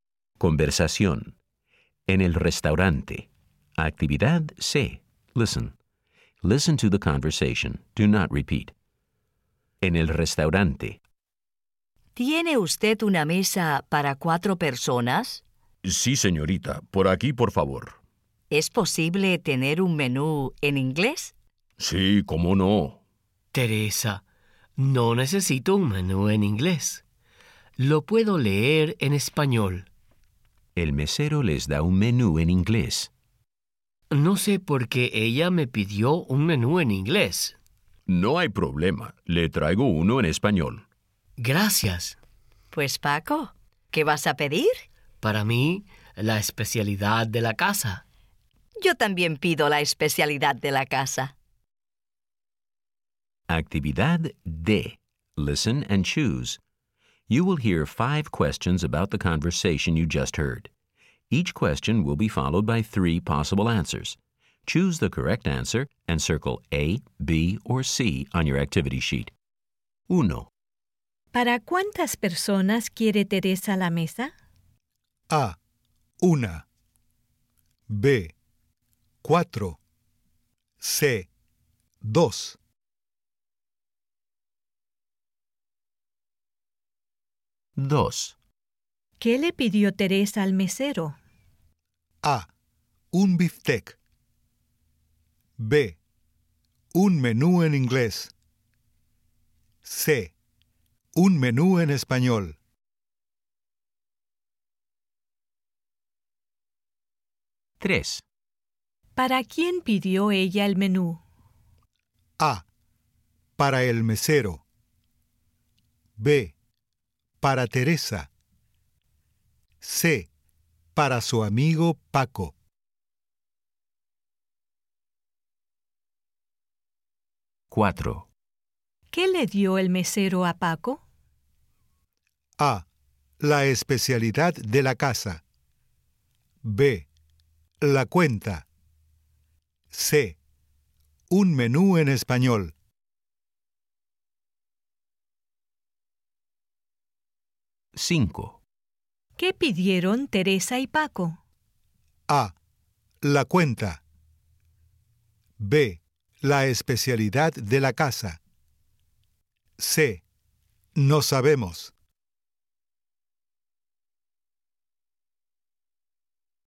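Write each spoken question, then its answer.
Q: ¿Para cuántas personas quiere Teresa la mesa?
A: B: Cuatro

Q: ¿Qué le pidió Teresa al mesero?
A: B: Un menú en inglés

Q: ¿Para quién pidió ella el menú?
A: C: Para su amigo Paco

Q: ¿Qué pidieron Teresa y Paco?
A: B: La especialidad de la casa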